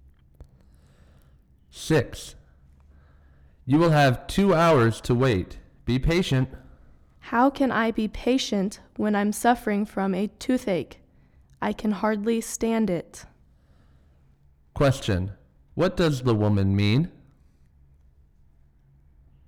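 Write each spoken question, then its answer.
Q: What does the woman mean?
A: She can't wait 2 hours because of her toothache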